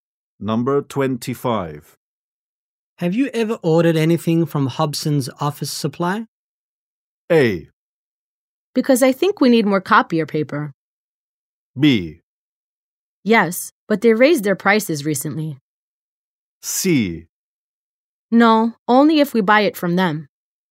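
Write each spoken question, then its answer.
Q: Have you ever ordered anything from Hobson's Office Supply?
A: B: Yes, but they raised their prices recently.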